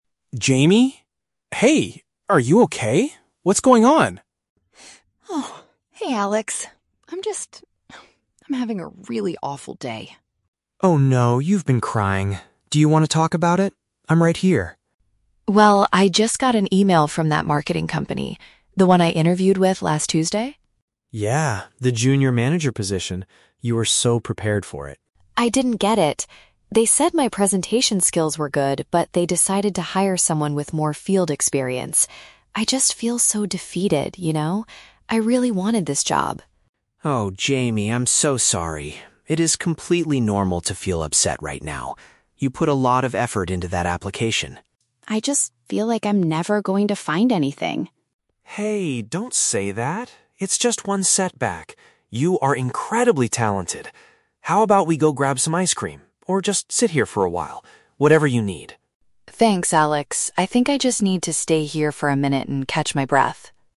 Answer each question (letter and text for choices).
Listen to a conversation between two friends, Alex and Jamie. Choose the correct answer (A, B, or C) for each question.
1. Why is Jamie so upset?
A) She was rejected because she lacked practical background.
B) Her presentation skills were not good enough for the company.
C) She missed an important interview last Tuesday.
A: A) She was rejected because she lacked practical background.

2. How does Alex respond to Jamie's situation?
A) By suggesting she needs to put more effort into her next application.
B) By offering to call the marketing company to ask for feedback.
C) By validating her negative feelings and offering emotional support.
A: C) By validating her negative feelings and offering emotional support.

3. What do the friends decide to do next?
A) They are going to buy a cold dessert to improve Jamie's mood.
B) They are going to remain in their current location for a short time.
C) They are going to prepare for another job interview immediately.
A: B) They are going to remain in their current location for a short time.

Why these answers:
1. Jamie says the company hired someone with "more field experience." Option (A) uses "practical background" as a synonym for field experience. Option (B) is a trap; the company actually said her presentation skills were good, not bad. Option (C) is false because she did attend the interview.
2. Alex says, "It is completely normal to feel upset right now" (validating feelings) and offers to sit with her or get ice cream (emotional support). Option (A) is a trap; Alex mentions the word "effort", but he says she already put a lot of effort in, not that she needs to do more. Option (B) is not mentioned.
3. Jamie says she just wants to "stay here for a minute and catch my breath," which matches option (B). Option (A) is a trap; Alex offered ice cream (a cold dessert), but Jamie chose to just sit instead. Option (C) is not mentioned.

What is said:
Alex: Jamie? Hey, are you okay? What's going on?
Jamie: Oh, hey Alex. I'm just... um, I'm having a really awful day.
Alex: Oh no, you've been crying. Do you want to talk about it? I'm right here.
Jamie: Well, I just got an email from that marketing company. The one I interviewed with last Tuesday?
Alex: Yeah, the junior manager position. You were so prepared for it.
Jamie: I didn't get it. They said my presentation skills were good, but they decided to hire someone with more field experience. I just feel so defeated, you know? I really wanted this job.
Alex: Oh, Jamie, I'm so sorry. It is completely normal to feel upset right now. You put a lot of effort into that application.
Jamie: I just feel like I'm never going to find anything.
Alex: Hey, don't say that. It's just one setback. You are incredibly talented. How about we go grab some ice cream, or just sit here for a while? Whatever you need.